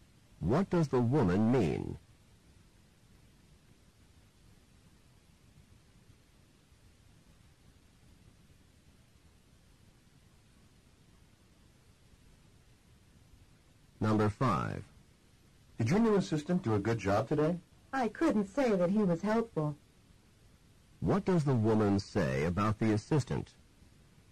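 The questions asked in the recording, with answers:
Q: What does the woman say about the assistant?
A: He was not helpful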